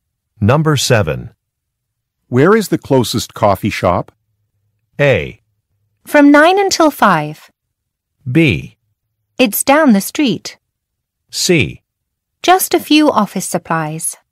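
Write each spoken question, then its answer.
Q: Where is the closest coffee shop?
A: B: It's down the street.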